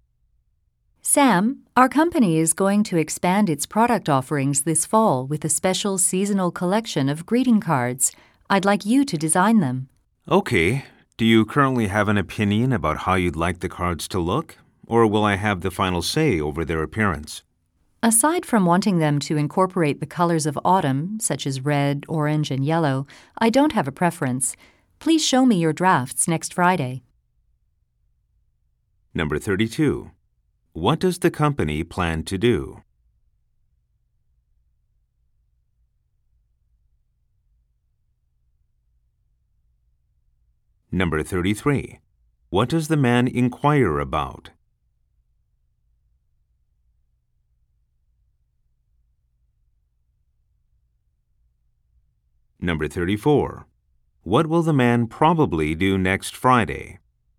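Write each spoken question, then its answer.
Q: What does the company plan to do?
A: Expand its product offerings with a seasonal collection of greeting cards

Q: What does the man inquire about?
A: Whether the woman has an opinion on how the cards should look

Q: What will the man probably do next Friday?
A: Show his drafts of the card designs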